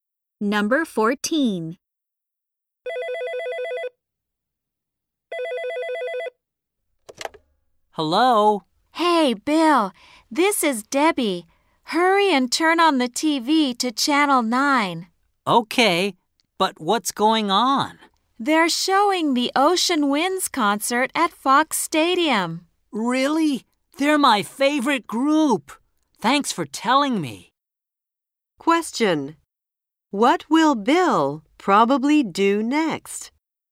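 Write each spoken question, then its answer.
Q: What will Bill probably do next?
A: Turn on the TV to watch the concert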